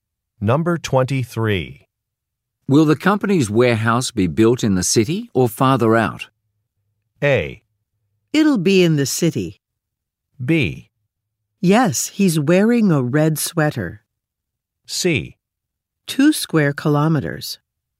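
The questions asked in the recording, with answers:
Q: Will the company's warehouse be built in the city or farther out?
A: A: It'll be in the city.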